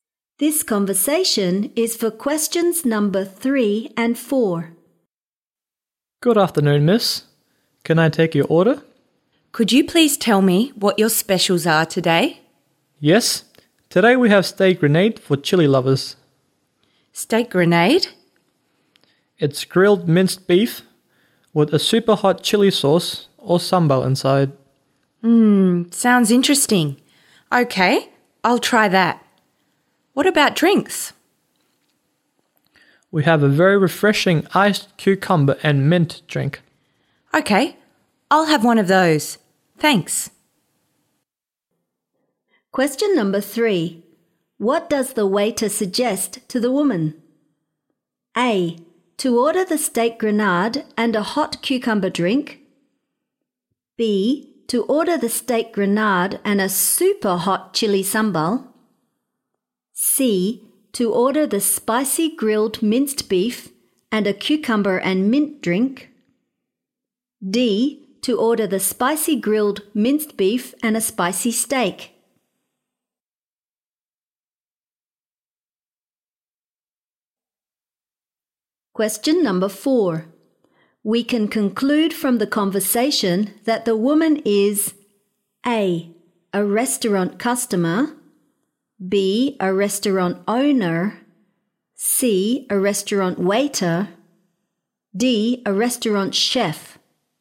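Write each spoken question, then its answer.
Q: What does the waiter suggest to the woman?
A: C: To order the spicy grilled minced beef and a cucumber and mint drink.

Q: We can conclude from the conversation that the woman is A.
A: A: A restaurant customer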